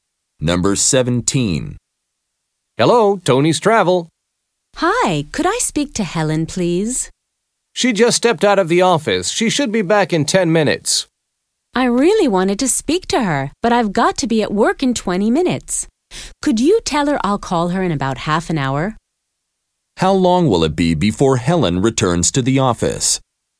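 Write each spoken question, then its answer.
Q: How long will it be before Helen returns to the office?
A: 10 minutes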